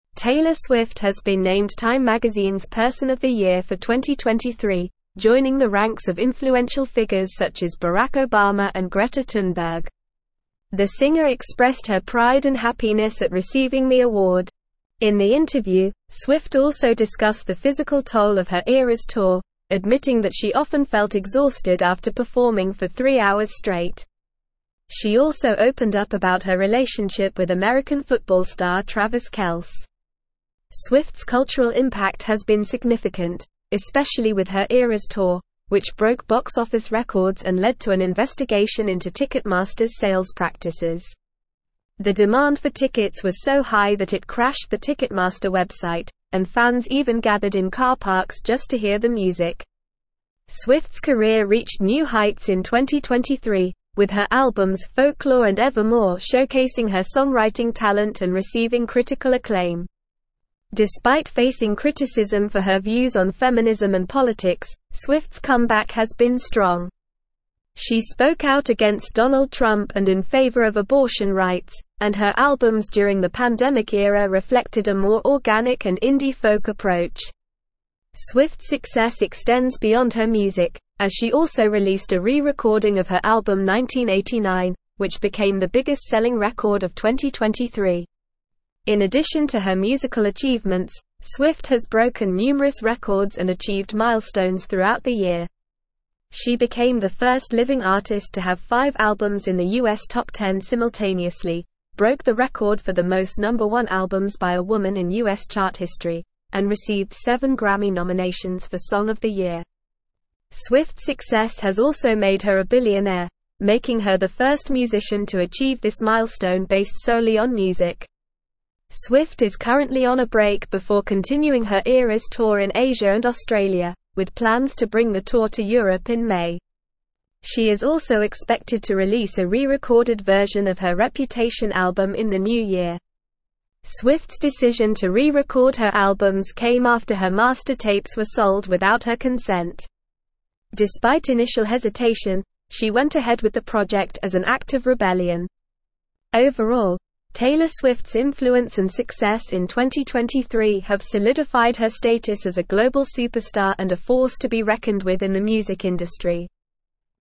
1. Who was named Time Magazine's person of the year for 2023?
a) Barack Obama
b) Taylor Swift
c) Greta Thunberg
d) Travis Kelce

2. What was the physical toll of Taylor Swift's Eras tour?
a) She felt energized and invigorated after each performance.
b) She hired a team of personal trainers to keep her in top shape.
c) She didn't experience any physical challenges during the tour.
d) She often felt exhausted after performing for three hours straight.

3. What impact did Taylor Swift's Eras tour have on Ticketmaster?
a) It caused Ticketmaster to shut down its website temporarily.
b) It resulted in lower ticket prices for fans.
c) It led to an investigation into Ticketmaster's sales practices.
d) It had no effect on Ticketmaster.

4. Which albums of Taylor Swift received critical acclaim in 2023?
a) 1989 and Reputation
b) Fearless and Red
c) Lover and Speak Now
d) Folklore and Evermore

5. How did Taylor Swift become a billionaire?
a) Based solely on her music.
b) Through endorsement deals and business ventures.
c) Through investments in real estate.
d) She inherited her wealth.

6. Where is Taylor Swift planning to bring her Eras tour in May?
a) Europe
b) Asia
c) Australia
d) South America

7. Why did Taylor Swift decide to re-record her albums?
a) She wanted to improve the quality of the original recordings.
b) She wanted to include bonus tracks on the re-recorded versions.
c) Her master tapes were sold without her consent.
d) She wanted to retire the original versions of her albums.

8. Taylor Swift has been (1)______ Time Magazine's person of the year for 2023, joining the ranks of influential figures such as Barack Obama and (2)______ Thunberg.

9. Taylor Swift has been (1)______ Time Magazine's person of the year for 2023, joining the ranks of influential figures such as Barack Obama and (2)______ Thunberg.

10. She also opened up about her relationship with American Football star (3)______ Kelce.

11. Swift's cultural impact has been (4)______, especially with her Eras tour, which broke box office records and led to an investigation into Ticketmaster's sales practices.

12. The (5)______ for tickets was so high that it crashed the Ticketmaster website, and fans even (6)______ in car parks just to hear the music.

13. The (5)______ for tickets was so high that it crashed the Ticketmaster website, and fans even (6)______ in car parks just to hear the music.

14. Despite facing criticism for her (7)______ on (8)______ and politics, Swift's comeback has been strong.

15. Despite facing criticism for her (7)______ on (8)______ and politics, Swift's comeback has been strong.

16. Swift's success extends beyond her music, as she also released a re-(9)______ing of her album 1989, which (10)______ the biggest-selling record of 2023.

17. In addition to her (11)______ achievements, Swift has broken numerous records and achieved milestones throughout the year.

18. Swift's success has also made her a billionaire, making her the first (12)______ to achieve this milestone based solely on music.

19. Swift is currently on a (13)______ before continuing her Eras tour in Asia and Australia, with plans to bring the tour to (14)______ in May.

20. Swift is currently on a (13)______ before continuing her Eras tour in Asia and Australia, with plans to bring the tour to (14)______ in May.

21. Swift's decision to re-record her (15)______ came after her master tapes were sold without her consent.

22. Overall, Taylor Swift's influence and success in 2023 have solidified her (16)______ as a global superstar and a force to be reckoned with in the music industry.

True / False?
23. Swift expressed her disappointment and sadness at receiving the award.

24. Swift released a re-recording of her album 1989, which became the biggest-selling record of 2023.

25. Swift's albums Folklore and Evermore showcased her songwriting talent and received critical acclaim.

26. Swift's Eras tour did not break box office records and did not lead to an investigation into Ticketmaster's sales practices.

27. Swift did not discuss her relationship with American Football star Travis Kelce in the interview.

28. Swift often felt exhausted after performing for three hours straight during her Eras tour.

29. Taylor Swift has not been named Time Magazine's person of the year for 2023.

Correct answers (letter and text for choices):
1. b) Taylor Swift
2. d) She often felt exhausted after performing for three hours straight.
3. c) It led to an investigation into Ticketmaster's sales practices.
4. d) Folklore and Evermore
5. a) Based solely on her music.
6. a) Europe
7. c) Her master tapes were sold without her consent.
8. named
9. Greta
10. Travis
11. significant
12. demand
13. gathered
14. views
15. feminism
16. became
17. musical
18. musician
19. break
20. Europe
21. albums
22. status
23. False
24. True
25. True
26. False
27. False
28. True
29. False

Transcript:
Taylor Swift has been named Time Magazine's person of the year for 2023, joining the ranks of influential figures such as Barack Obama and Greta Thunberg. The singer expressed her pride and happiness at receiving the award. In the interview, Swift also discussed the physical toll of her Eras tour, admitting that she often felt exhausted after performing for three hours straight. She also opened up about her relationship with American Football star Travis Kelce.
Swift's cultural impact has been significant, especially with her Eras tour, which broke box office records and led to an investigation into Ticketmaster's sales practices. The demand for tickets was so high that it crashed the Ticketmaster website, and fans even gathered in car parks just to hear the music. Swift's career reached new heights in 2023, with her albums Folklore and Evermore showcasing her songwriting talent and receiving critical acclaim.
Despite facing criticism for her views on feminism and politics, Swift's comeback has been strong. She spoke out against Donald Trump and in favor of abortion rights, and her albums during the pandemic era reflected a more organic and indie-folk approach. Swift's success extends beyond her music, as she also released a re-recording of her album 1989, which became the biggest-selling record of 2023.
In addition to her musical achievements, Swift has broken numerous records and achieved milestones throughout the year. She became the first living artist to have five albums in the US Top 10 simultaneously, broke the record for the most number one albums by a woman in US chart history, and received seven Grammy nominations for song of the year. Swift's success has also made her a billionaire, making her the first musician to achieve this milestone based solely on music.
Swift is currently on a break before continuing her Eras tour in Asia and Australia, with plans to bring the tour to Europe in May. She is also expected to release a re-recorded version of her Reputation album in the new year. Swift's decision to re-record her albums came after her master tapes were sold without her consent. Despite initial hesitation, she went ahead with the project as an act of rebellion.
Overall, Taylor Swift's influence and success in 2023 have solidified her status as a global superstar and a force to be reckoned with in the music industry.

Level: Level 4